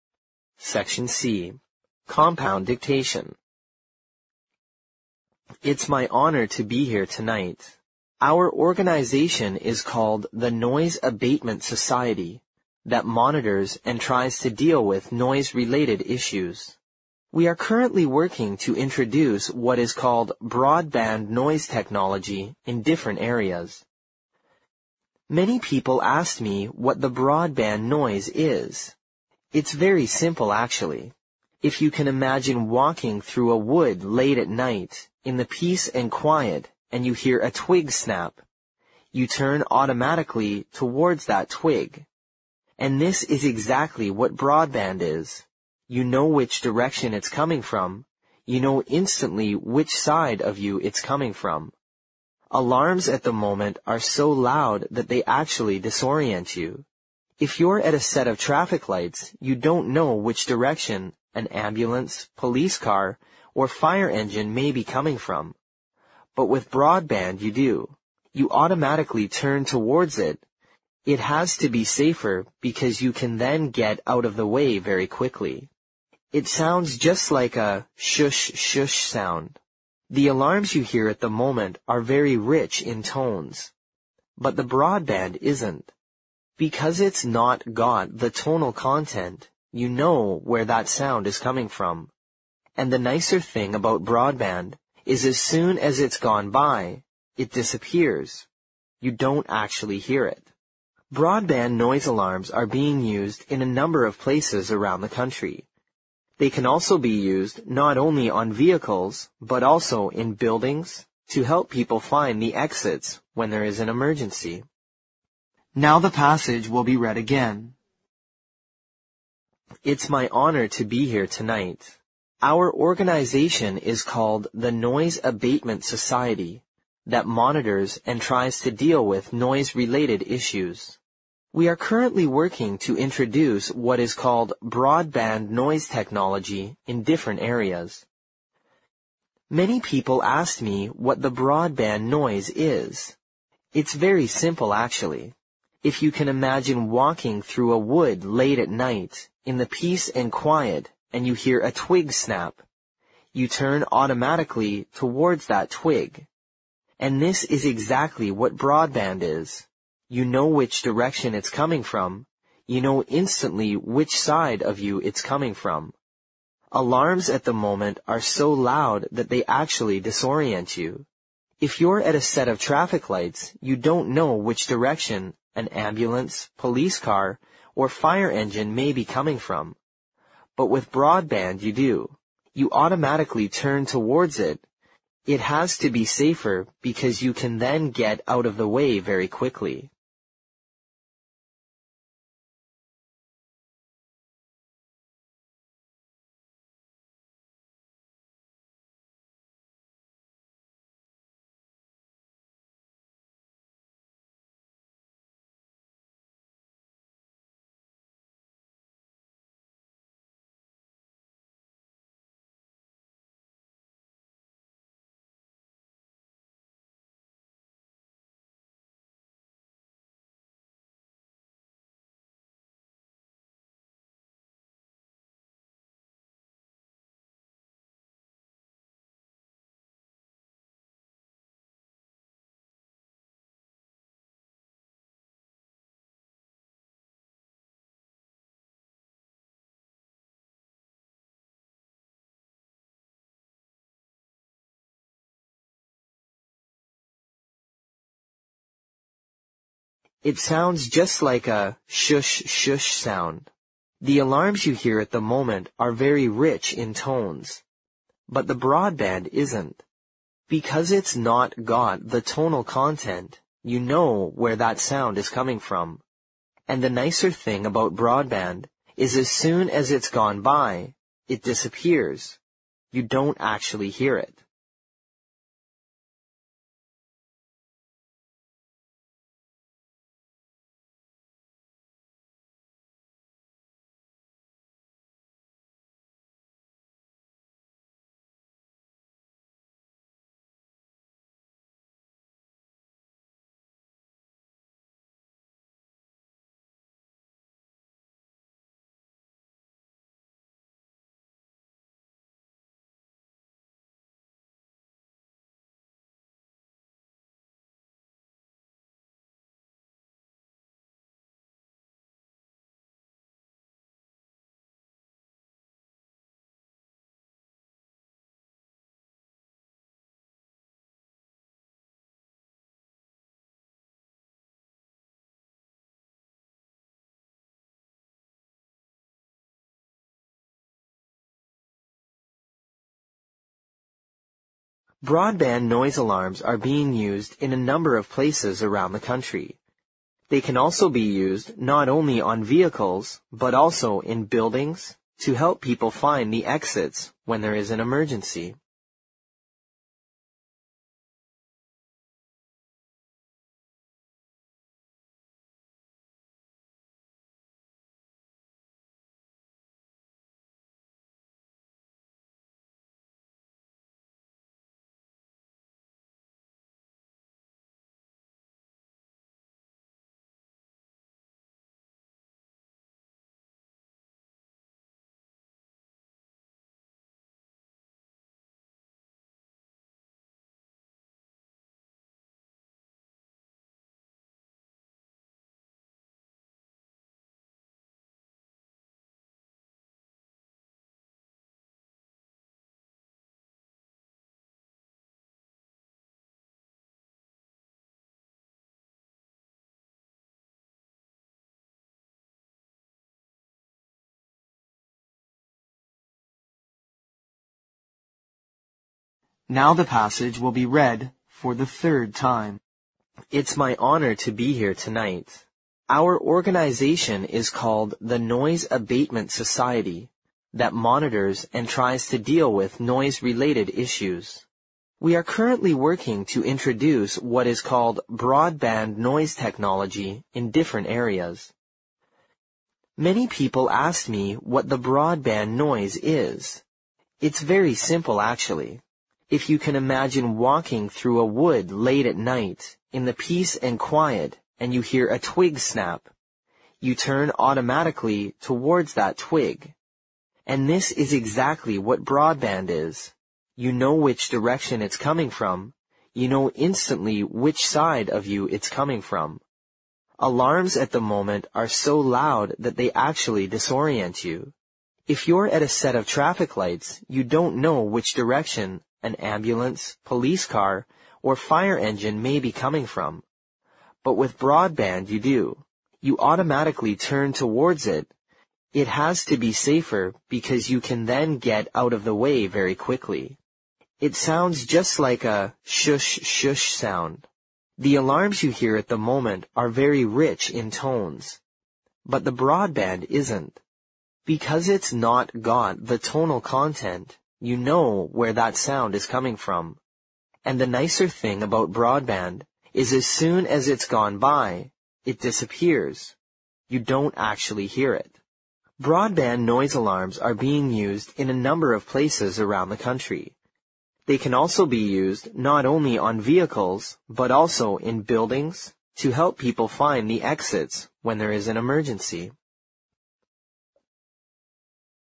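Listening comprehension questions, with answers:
Compound Dictation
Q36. Our organization is called the Noise Abatement Society that (36) ______ and tries to deal with noise (37) ______ issues.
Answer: monitors

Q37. Our organization is called the Noise Abatement Society that (36) ______ and tries to deal with noise (37) ______ issues.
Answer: related

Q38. It's very simple actually, if you can imagine (38) ______ through a wood late at night in the (39) ______ and quiet and you hear a twig (40) ______ , you turn automatically towards that twig.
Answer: walking

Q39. It's very simple actually, if you can imagine (38) ______ through a wood late at night in the (39) ______ and quiet and you hear a twig (40) ______ , you turn automatically towards that twig.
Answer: peace

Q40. It's very simple actually, if you can imagine (38) ______ through a wood late at night in the (39) ______ and quiet and you hear a twig (40) ______ , you turn automatically towards that twig.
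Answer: snap

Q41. you know (41) ______ which side of you it's coming from.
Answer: instantly

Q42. Alarms at the moment are so loud that they actually (42) ______ you.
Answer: disorient

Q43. If you're at a set of traffic (43) ______ , you don't know which direction an ambulance, a police car or a fire engine may be coming from, but with broadband you do.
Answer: lights

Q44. (44) _________________________________________________________ .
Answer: You automatically turn towards it. It has to be safer because you can then get out of the way very quickly

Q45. (45) __________________________________________________________________ .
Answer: And the nicer thing about broadband is as soon as it's gone by, it disappears. You don't actually hear it

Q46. (46) _________________________________________________________ .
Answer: They can also be used not only on vehicles, but also in buildings to help people find the exits when there is an emergency

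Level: 六级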